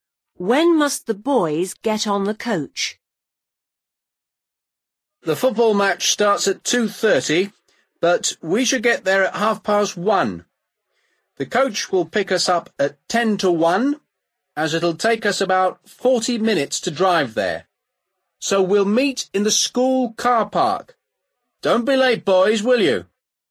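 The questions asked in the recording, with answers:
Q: When must the boys get on the coach?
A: At ten to one (12:50)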